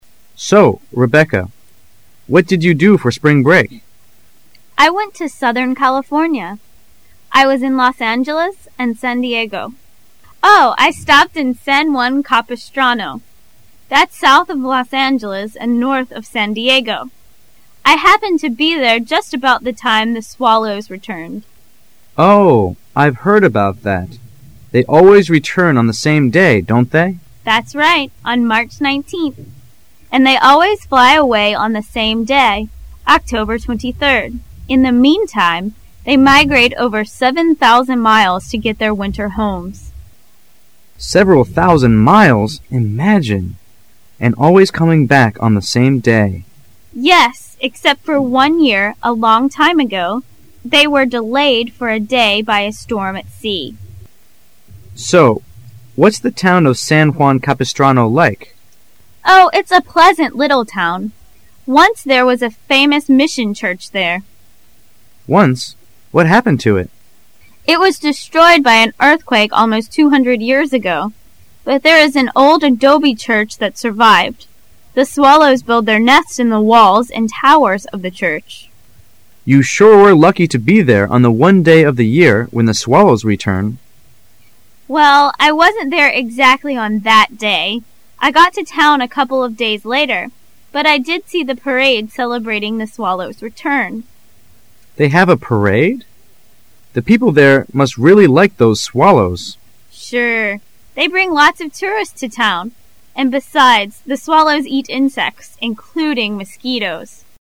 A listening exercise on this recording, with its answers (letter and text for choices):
Directions:In this section you will hear a conversation. Questions 1 to 4 are based on the conversation. Listen to the conversation carefully and then answer the four questions below. Mark the corresponding letter on the Answer Sheet with a single line through the center.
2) What can be inferred about the swallows mentioned in the conversation?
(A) They are a type of insect.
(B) They are a kind of fish.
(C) They are a type of bird.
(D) They are a type of pig.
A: (C) They are a type of bird.

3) When do the swallows return to San Juan Capistrano?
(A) In March.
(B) In early summer.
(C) In October.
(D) In April.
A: (A) In March.

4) How far do the swallows migrate?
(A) About 200 miles.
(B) About 1, 000 miles.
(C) About 7,000 miles.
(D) About 5,000 miles.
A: (C) About 7,000 miles.

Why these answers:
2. 细节题。关于swallows。 [详细解答]They always return on the same day on March 19'h,and ny away on the same day,October 23rd.因此可推测它们是一种鸟。因此选C
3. 细节题。 [详细解答]Swallows何时回到San Juan Capistrano.They always return on March 19th.故选A。

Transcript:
[解析] 1-4 M1: So, Rebecca, what did you do for spring break? F1: I went to southern California. I was in Los Angeles and San Diego Oh, and I stopped in San Juan Capistrano. That's south of Los Angeles and north of San Diego. I happened to be there just about the time the swallows returned. M1: Oh, I've heard about that - they always return on the same day, don't they? F1: That's right, on March 19th. And they always fly a way on the same day, October 23rd. In the meantime, they migrate over 7,000 miles to get to their winter homes. M1: Seven thousand miles imagine! And always coming back on the same day! F1: Yes, except for one year, a long time ago they were delayed for a day by a storm at sea. M1: So, what's the town of San Juan Capistrano like? F1: Oh, it's a pleasant little town. Once there was a famous mission church there. M1: Once? What happened to it? F1: It was destroyed by an earthquake almost two hundred years ago. But there is an old adobe church that survived. The swallows build their nests in the walls and towers of that church. M1: You sure were lucky to be there on the one day of the year when the swallows return. F1: Well, I wasn't there exactly on that day. I got to town a couple of days later but I did see the parade celebrating the swallows'return. M1: They have a parade? The people there must really like those swallows. F1: Sure they bring lots of tourists to town, and besides, the swallows eat insects including mosquitoes!